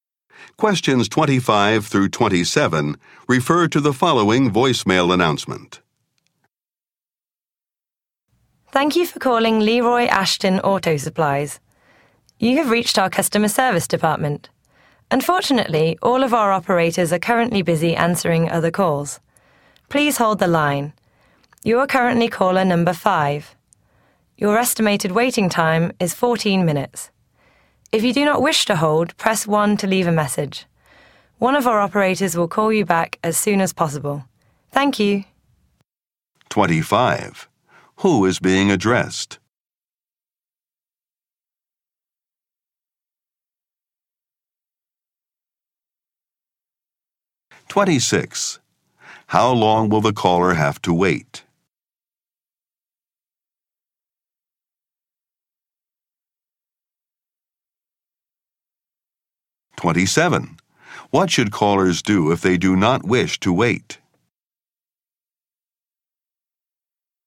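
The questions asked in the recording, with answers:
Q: Who is being addressed?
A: Callers to the customer service department

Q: How long will the caller have to wait?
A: About 14 minutes

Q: What should callers do if they do not wish to wait?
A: Press 1 to leave a message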